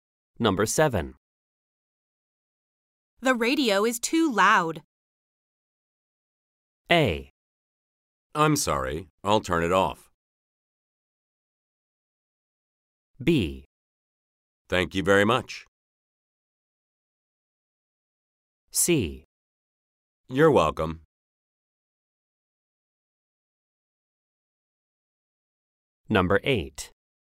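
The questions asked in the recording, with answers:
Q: The radio is too loud.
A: A: I'm sorry, I'll turn it off.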